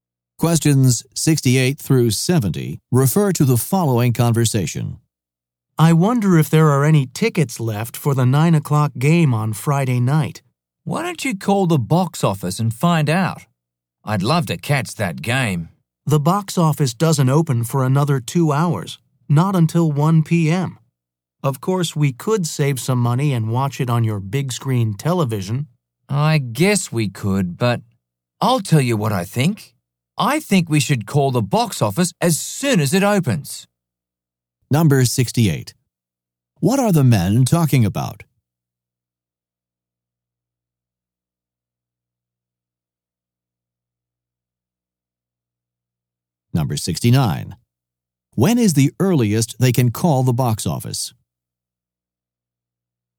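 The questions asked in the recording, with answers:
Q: What are the men talking about?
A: Getting tickets for Friday night's game

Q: When is the earliest they can call the box office?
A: At 1 p.m.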